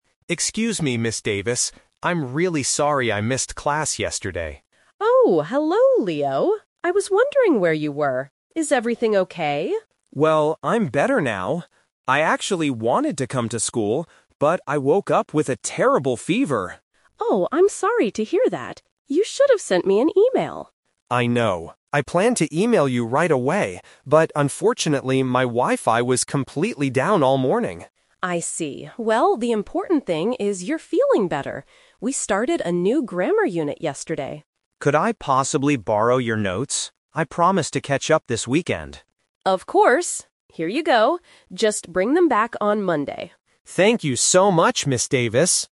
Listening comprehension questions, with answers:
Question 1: Why was Leo absent from class yesterday?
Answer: He had a fever.

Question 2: Why didn't Leo tell Ms. Davis that he was staying home?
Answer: His internet wasn't working.

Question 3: What does Ms. Davis give to Leo?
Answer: Her class notes.

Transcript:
Leo: Excuse me, Ms. Davis. I'm really sorry I missed class yesterday.
Ms. Davis: Oh, hello Leo. I was wondering where you were. Is everything okay?
Leo: Well, I'm better now. I actually wanted to come to school, but I woke up with a terrible fever.
Ms. Davis: Oh, I'm sorry to hear that. You should have sent me an email.
Leo: I know. I planned to email you right away, but unfortunately, my Wi-Fi was completely down all morning.
Davis: I see. Well, the important thing is you're feeling better. We started a new grammar unit yesterday.
Leo: Could I possibly borrow your notes? I promise to catch up this weekend.
Ms. Davis: Of course. Here you go. Just bring them back on Monday.
Leo: Thank you so much, Ms. Davis!